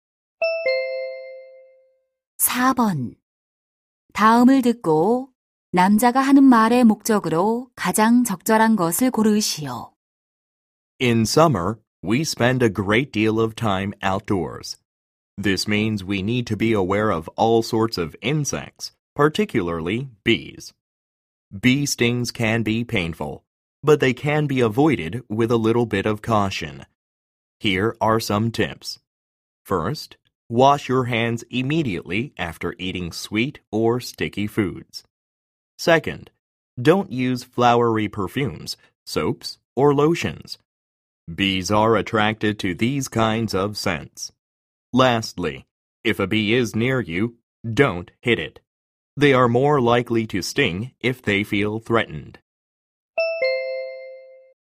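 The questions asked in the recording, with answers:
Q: 다음을 듣고 남자가 하는 말의 목적으로 가장 적절한 것을 고르시오.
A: 벌에 쏘이지 않는 방법을 알려 주려고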